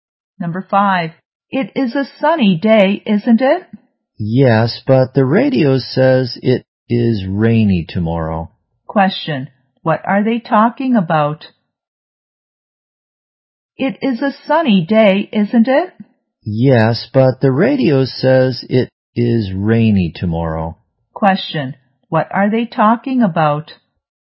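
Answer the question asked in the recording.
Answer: The weather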